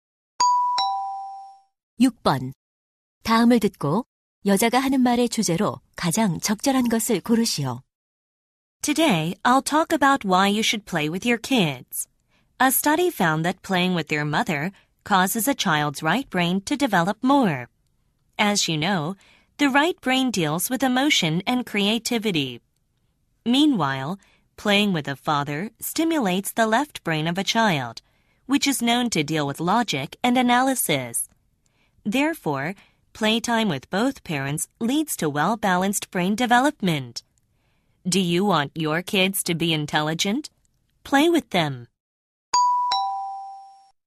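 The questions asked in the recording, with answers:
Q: 다음을 듣고 여자가 하는 말의 주제로 가장 적절한 것을 고르시오.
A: 부모 모두와 노는 것이 아이의 균형 잡힌 두뇌 발달에 주는 도움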